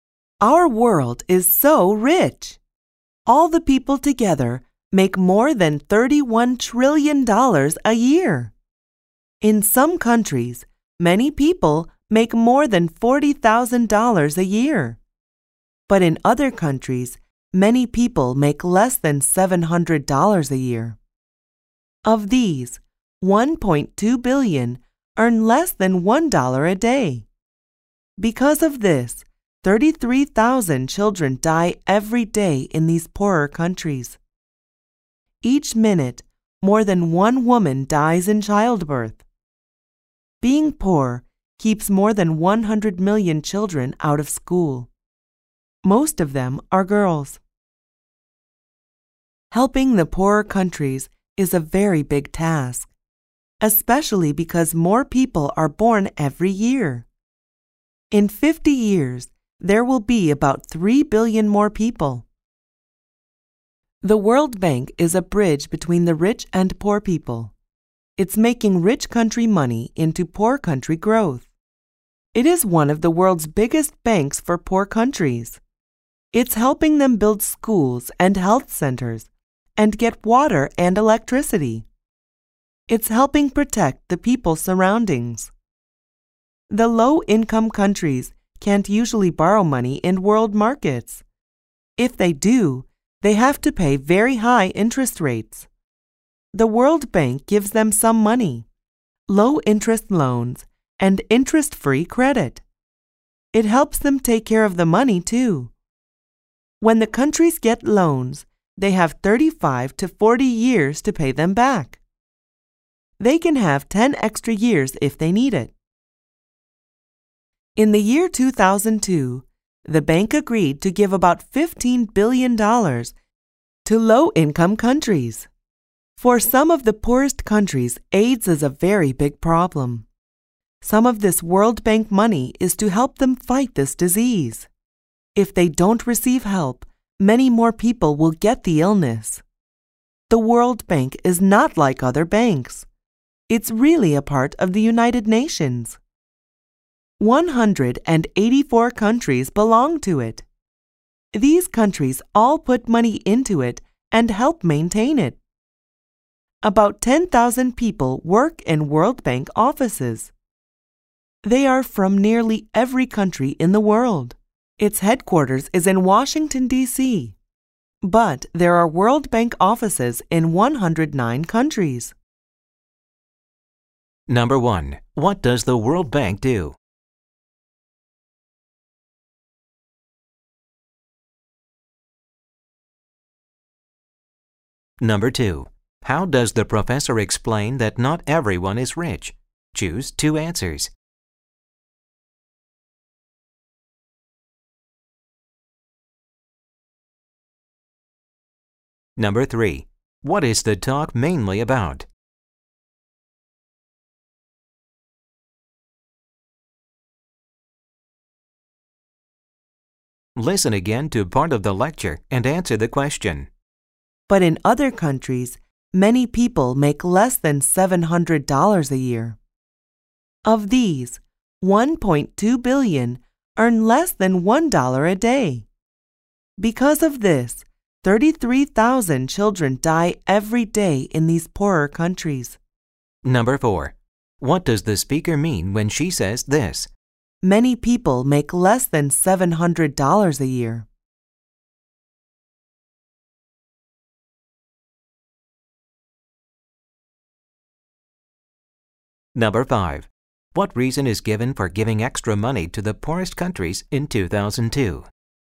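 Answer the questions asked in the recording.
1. It lends money from rich countries to poor countries for growth (low-interest loans, interest-free credit)
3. The World Bank and how it helps poor countries
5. To help them fight AIDS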